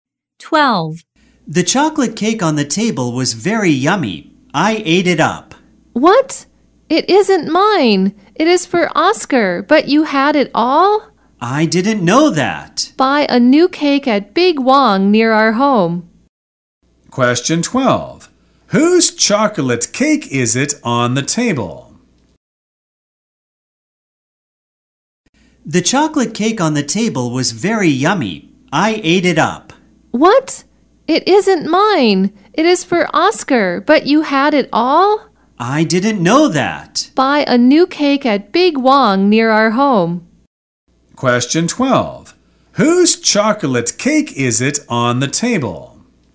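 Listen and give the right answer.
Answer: Oscar's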